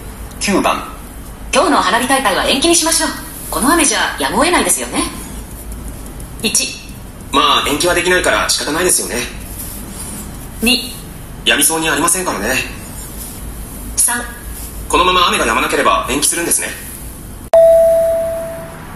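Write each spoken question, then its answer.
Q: 今日の花火大会は延期にしましょう、この雨じゃやむを得ないですよね。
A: 2: やみそうにありませんからね。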